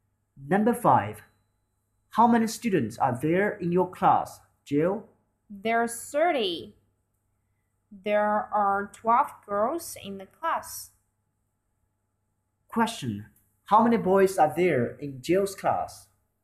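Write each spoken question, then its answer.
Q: How many boys are there in Jill's class?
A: 18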